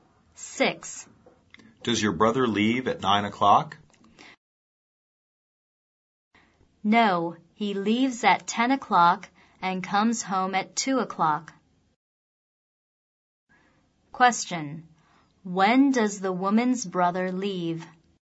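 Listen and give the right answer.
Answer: At 10 o'clock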